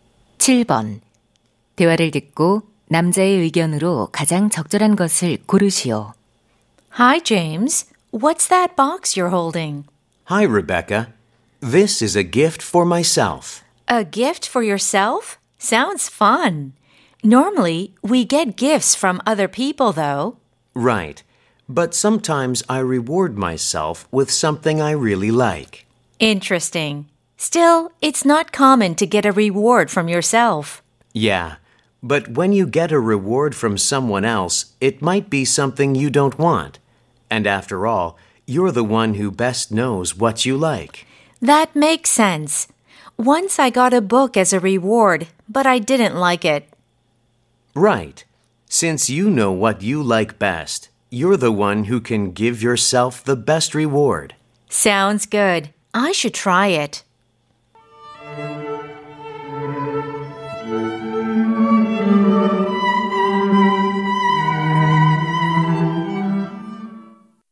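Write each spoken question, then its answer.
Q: 대화를 듣고 남자의 의견으로 가장 적절한 것을 고르시오.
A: 자신이 좋아하는 것을 가장 잘 알기에 스스로에게 최고의 보상을 줄 수 있다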